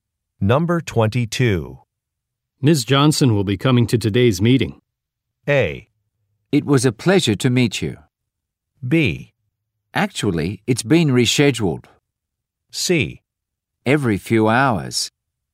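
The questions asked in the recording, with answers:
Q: Ms. Johnson will be coming to today's meeting.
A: B: Actually, it's been rescheduled.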